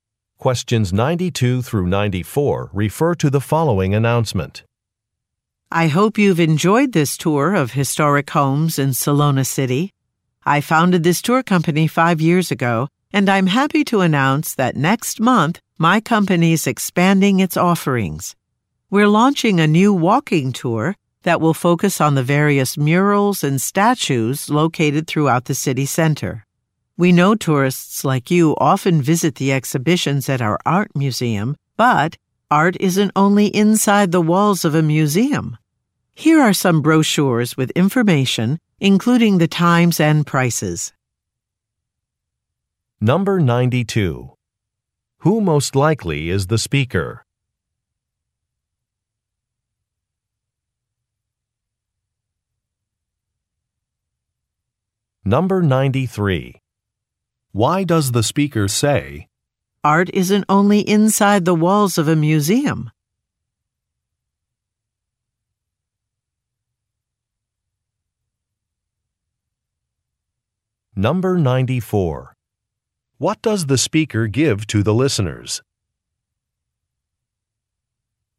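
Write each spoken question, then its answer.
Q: Who most likely is the speaker?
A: A tour company owner / tour guide

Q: What does the speaker give to the listeners?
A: Brochures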